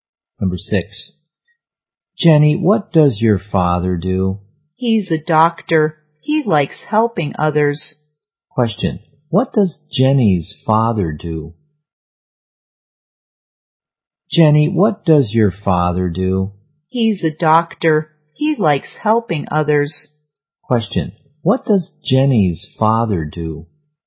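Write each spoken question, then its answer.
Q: What does Jenny's father do?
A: He's a doctor.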